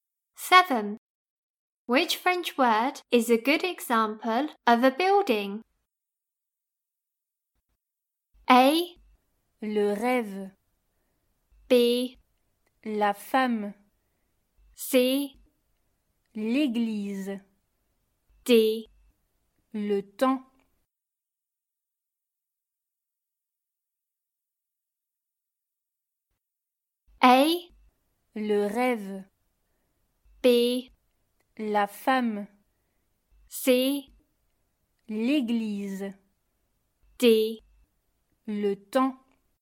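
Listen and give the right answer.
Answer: C: L'église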